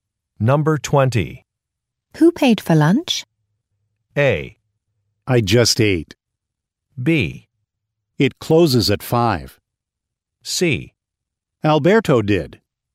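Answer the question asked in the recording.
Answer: C: Alberto did.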